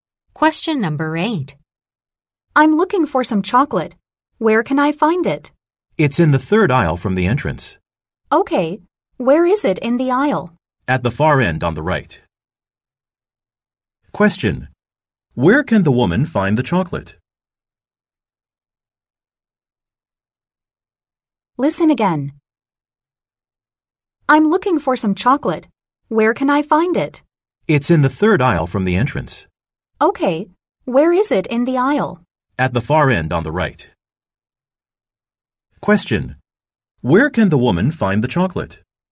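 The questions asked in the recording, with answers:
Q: Where can the woman find the chocolate?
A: In the third aisle from the entrance, at the far end on the right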